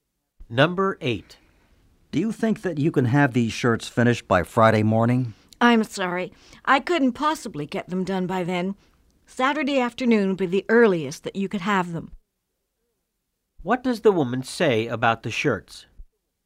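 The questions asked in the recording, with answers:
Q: What does the woman say about the shirts?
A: They won't be ready until Saturday afternoon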